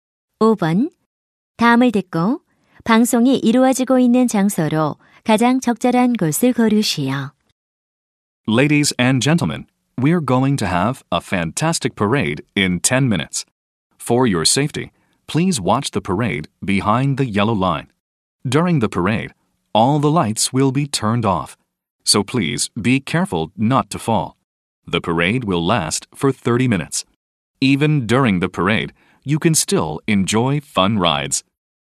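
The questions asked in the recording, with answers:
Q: 다음을 듣고 방송이 이루어지고 있는 장소로 가장 적절한 곳을 고르시오.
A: 놀이공원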